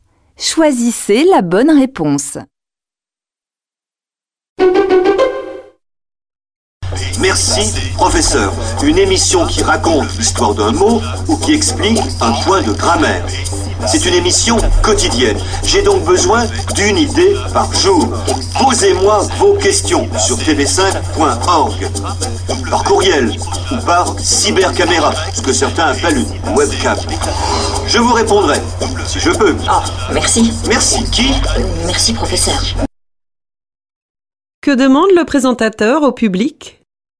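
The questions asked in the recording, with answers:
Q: Que demande le présentateur au public ?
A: De lui poser des questions (sur tv5.org, par courriel ou par webcam)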